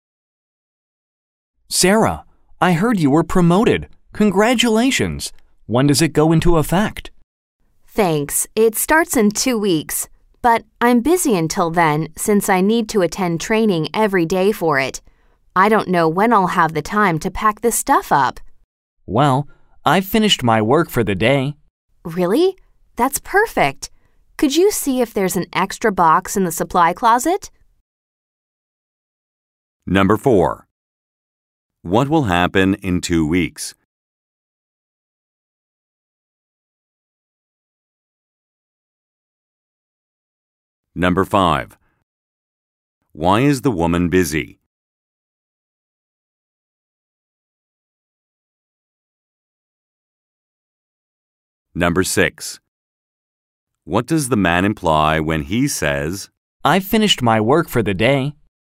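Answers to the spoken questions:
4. The woman's promotion will go into effect.
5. She has to attend training every day.
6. He has time to help her pack.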